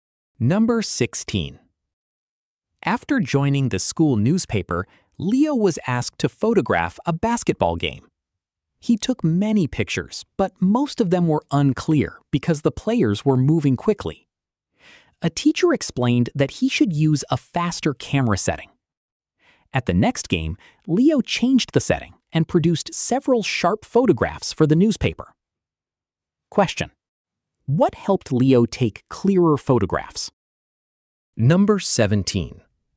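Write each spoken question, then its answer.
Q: what helped Leo take clearer photographs?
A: Using a faster camera setting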